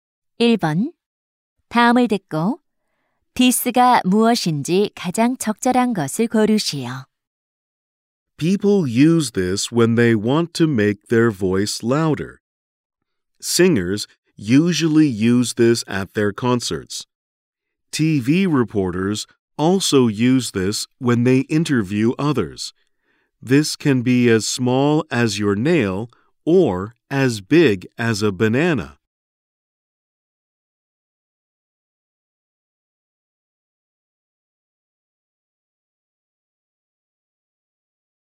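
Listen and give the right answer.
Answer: 마이크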